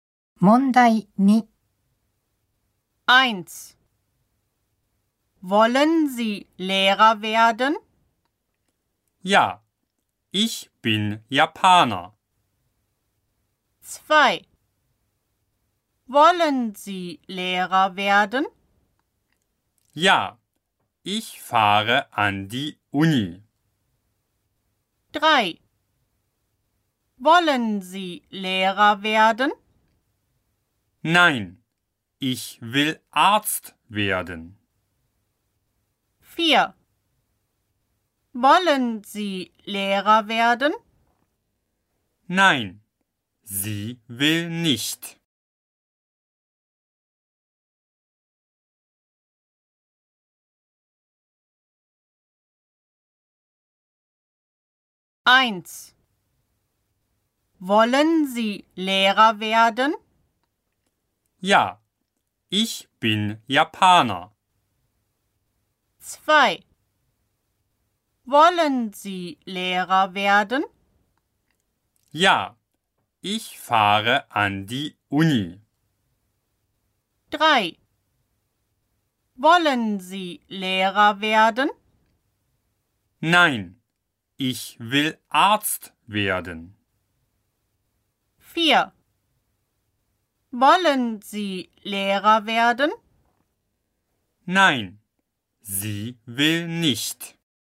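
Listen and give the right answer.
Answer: 3: Nein, ich will Arzt werden.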